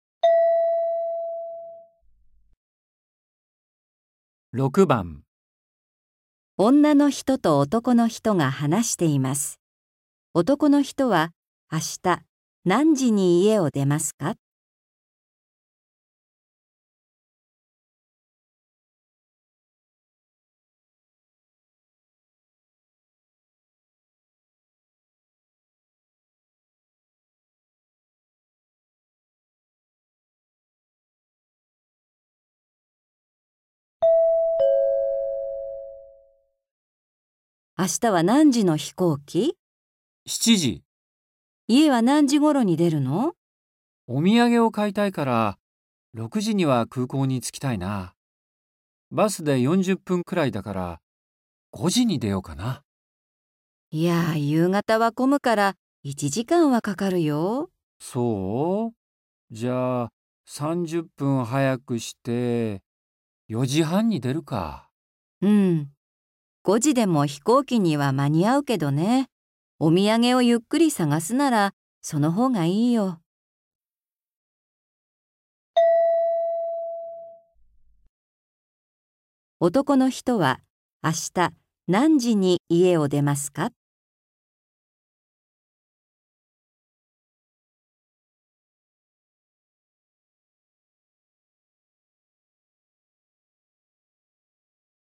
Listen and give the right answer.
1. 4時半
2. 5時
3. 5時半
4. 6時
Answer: 1. 4時半

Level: N4